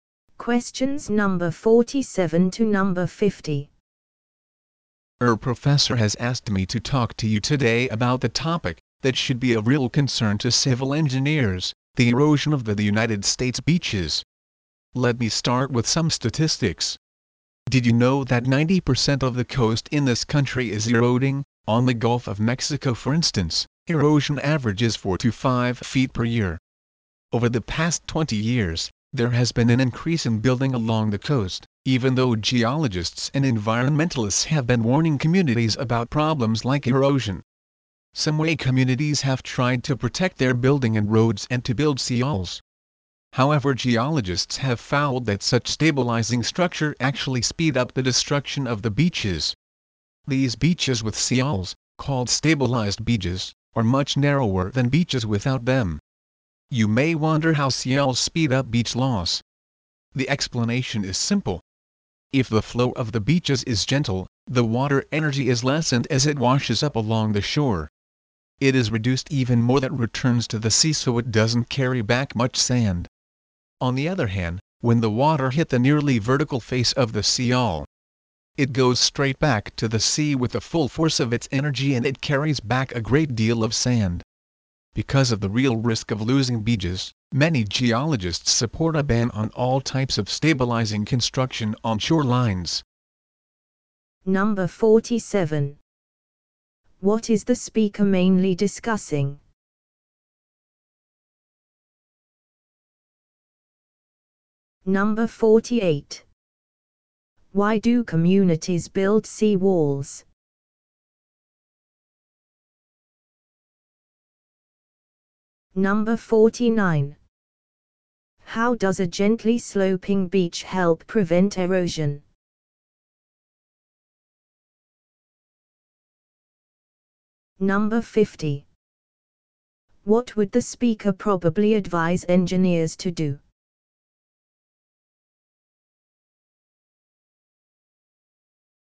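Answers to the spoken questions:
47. Beach erosion in the U.S. and how seawalls speed it up
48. To protect their buildings and roads
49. It reduces the water's energy, so less sand is carried back to the sea
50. Not build stabilizing structures on shorelines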